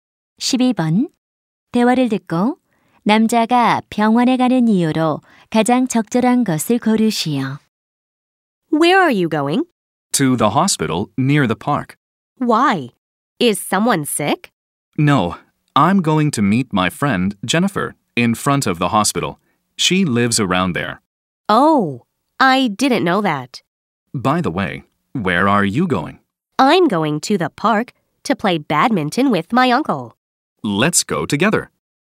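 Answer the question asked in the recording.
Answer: 친구 Jennifer를 병원 앞에서 만나기 위해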